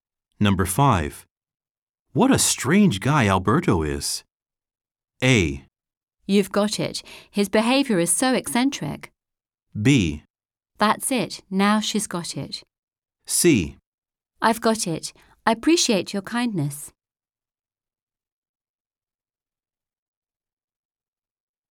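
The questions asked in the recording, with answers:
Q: What a strange guy Alberto is.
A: A: You've got it. His behavior is so eccentric.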